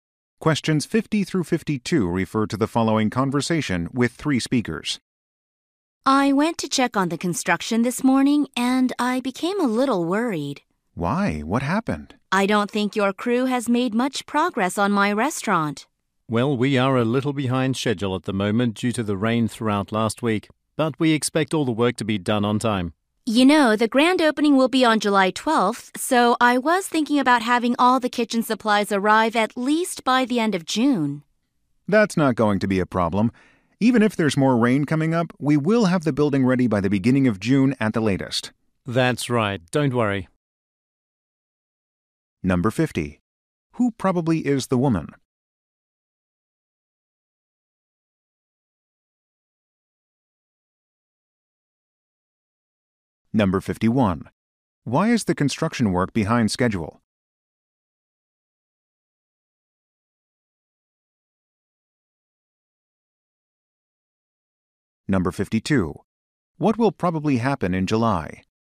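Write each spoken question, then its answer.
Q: Why is the construction work behind schedule?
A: Because of rain last week

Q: What will probably happen in July?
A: The restaurant's grand opening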